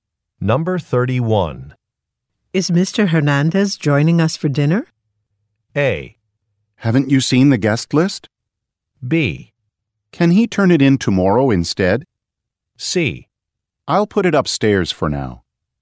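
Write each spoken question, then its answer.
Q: Is Mr. Hernandez joining us for dinner?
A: A: Haven't you seen the guest list?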